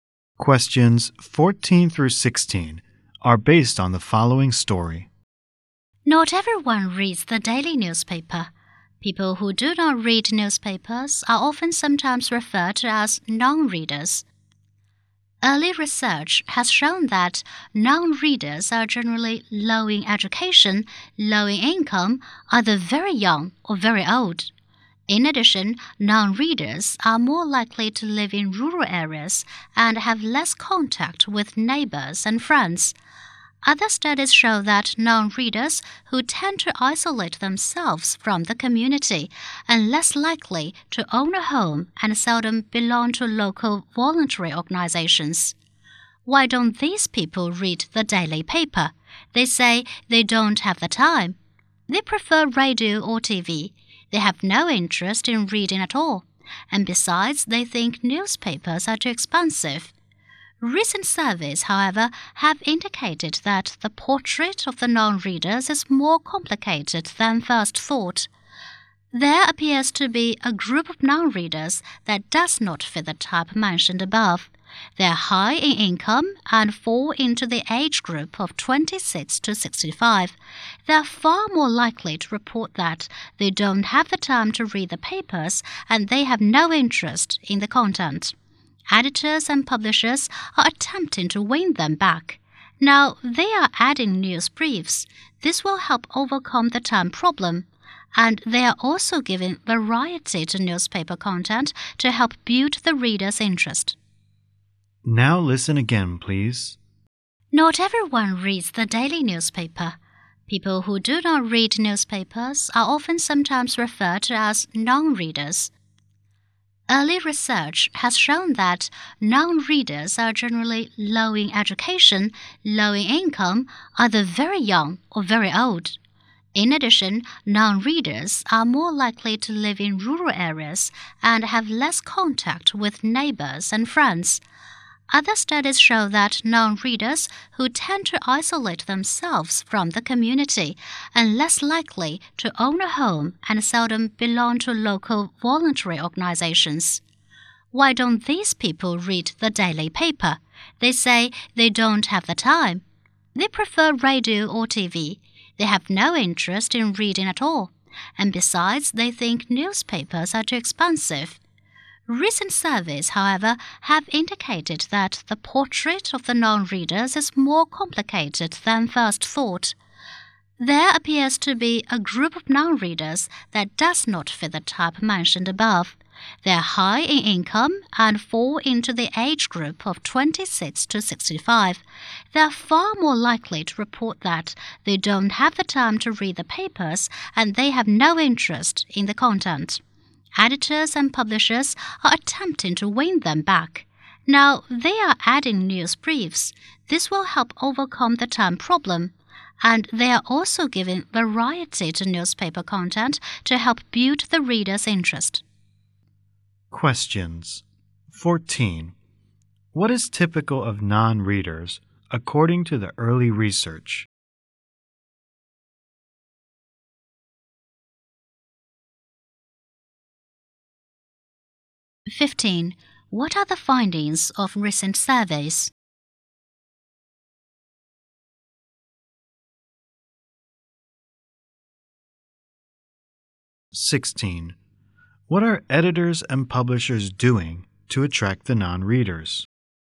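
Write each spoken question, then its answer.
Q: What is typical of non-readers according to the early research?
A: Low education and income, very young or very old

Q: What are the findings of recent surveys?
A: Some non-readers are high-income people aged 26 to 65.

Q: What are editors and publishers doing to attract the non-readers?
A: Adding news briefs and varying the content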